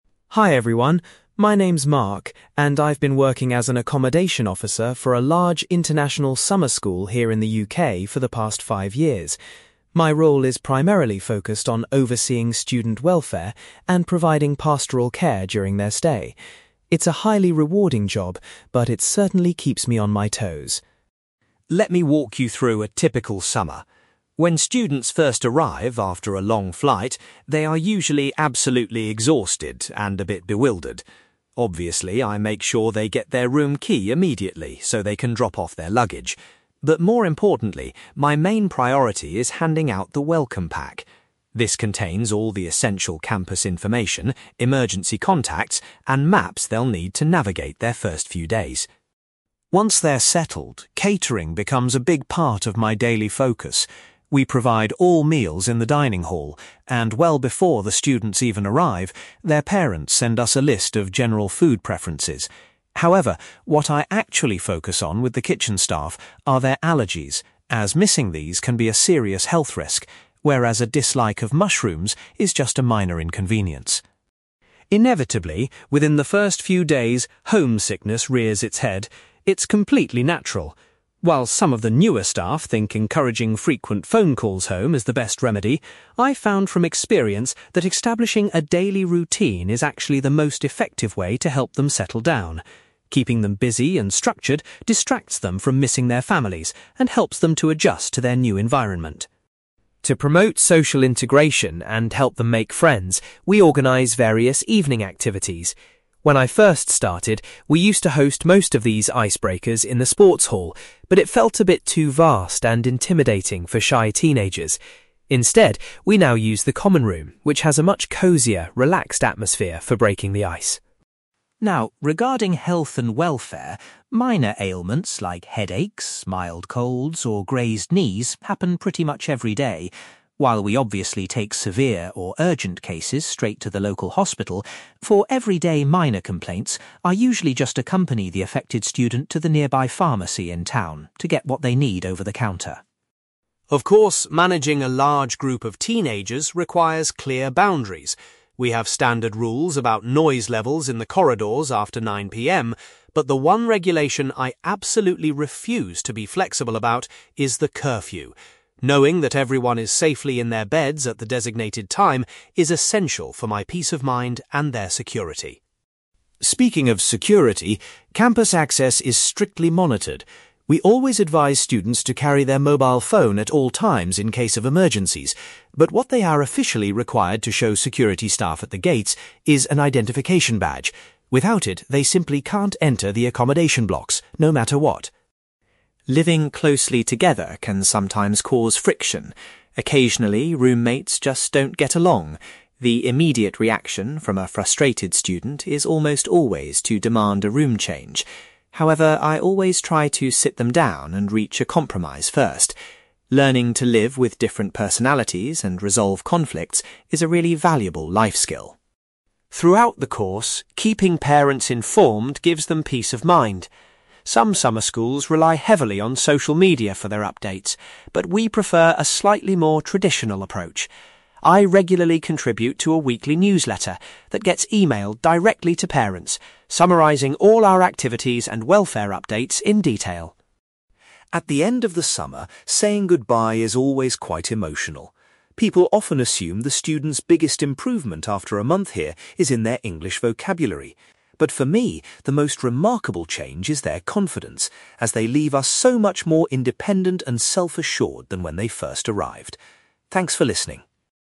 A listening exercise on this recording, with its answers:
You will hear a man called Mark giving a presentation about his job as an accommodation officer at a summer school. For questions 9-18, complete the sentences with a word or short phrase.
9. Mark's first main task upon the students' arrival is providing them with a (9)........................... .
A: welcome pack

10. Regarding students' diets, Mark pays the most attention to any (10)........................... they might have.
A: allergies

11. Mark believes that helping students form a (11)........................... is the best cure for homesickness.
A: daily routine

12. Evening social events are currently held in the (12)........................... to encourage students to mix.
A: common room

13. For minor medical issues, Mark will take a student to the local (13)........................... .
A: pharmacy

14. Mark states that he is incredibly strict when it comes to enforcing the (14)........................... .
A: curfew

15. Students must present an (15)........................... to gain access to the accommodation buildings.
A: identification badge

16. When roommates argue, Mark's first step is to help them find a (16)........................... .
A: compromise

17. Parents are kept up to date with welfare issues by reading a (17)........................... .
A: weekly newsletter

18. Mark feels that the greatest development in students by the end of the course is their increased (18)........................... .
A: confidence

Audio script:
Mark: Hi everyone, my name is Mark, and I've been working as an accommodation officer for a large international summer school here in the UK for the past five years. My role is primarily focused on overseeing student welfare and providing pastoral care during their stay. It's a highly rewarding job, but it certainly keeps me on my toes!
Let me walk you through a typical summer. When students first arrive after a long flight, they are usually absolutely exhausted and a bit bewildered. Obviously, I make sure they get their room key immediately so they can drop off their luggage. But more importantly, my main priority is handing out the welcome pack. This contains all the essential campus information, emergency contacts, and maps they'll need to navigate their first few days.
Once they're settled, catering becomes a big part of my daily focus. We provide all meals in the dining hall, and well before the students even arrive, their parents send us a list of general food preferences. However, what I actually focus on with the kitchen staff are their allergies, as missing these can be a serious health risk, whereas a dislike of mushrooms is just a minor inconvenience.
Inevitably, within the first few days, homesickness rears its head. It's completely natural. While some of the newer staff think encouraging frequent phone calls home is the best remedy, I've found from experience that establishing a daily routine is actually the most effective way to help them settle down. Keeping them busy and structured distracts them from missing their families and helps them adjust to their new environment.
To promote social integration and help them make friends, we organise various evening activities. When I first started, we used to host most of these ice-breakers in the sports hall, but it felt a bit too vast and intimidating for shy teenagers. Instead, we now use the common room, which has a much cozier, relaxed atmosphere for breaking the ice.
Now, regarding health and welfare, minor ailments like headaches, mild colds, or grazed knees happen pretty much every day. While we obviously take severe or urgent cases straight to the local hospital, for everyday minor complaints, I usually just accompany the affected student to the nearby pharmacy in town to get what they need over the counter.
Of course, managing a large group of teenagers requires clear boundaries. We have standard rules about noise levels in the corridors after 9 PM, but the one regulation I absolutely refuse to be flexible about is the curfew. Knowing that everyone is safely in their beds at the designated time is essential for my peace of mind and their security.
Speaking of security, campus access is strictly monitored. We always advise students to carry their mobile phone at all times in case of emergencies, but what they are officially required to show security staff at the gates is an identification badge. Without it, they simply can't enter the accommodation blocks, no matter what.
Living closely together can sometimes cause friction. Occasionally, roommates just don't get along. The immediate reaction from a frustrated student is almost always to demand a room change. However, I always try to sit them down and reach a compromise first. Learning to live with different personalities and resolve conflicts is a really valuable life skill.
Throughout the course, keeping parents informed gives them peace of mind. Some summer schools rely heavily on social media for their updates, but we prefer a slightly more traditional approach. I regularly contribute to a weekly newsletter that gets emailed directly to parents, summarising all our activities and welfare updates in detail.
At the end of the summer, saying goodbye is always quite emotional. People often assume the students' biggest improvement after a month here is in their English vocabulary. But for me, the most remarkable change is their confidence, as they leave us so much more independent and self-assured than when they first arrived. Thanks for listening!

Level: B2